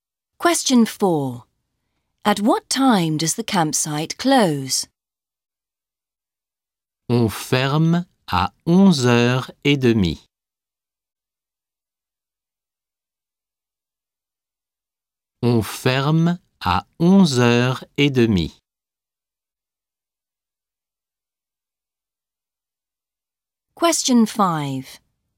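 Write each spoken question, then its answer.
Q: At what time does the campsite close?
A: 11:30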